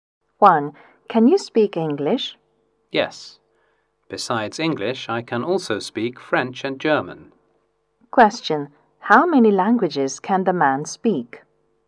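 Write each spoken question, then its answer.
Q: How many languages can the man speak?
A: Three (English, French and German)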